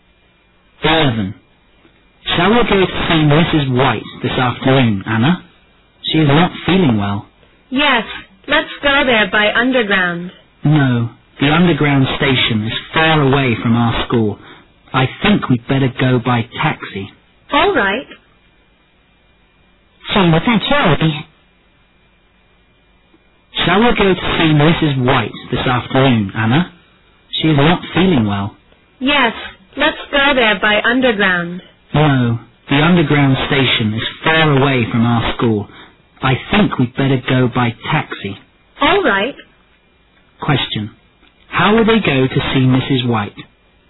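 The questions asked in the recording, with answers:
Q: How will they go to see Mrs.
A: By taxi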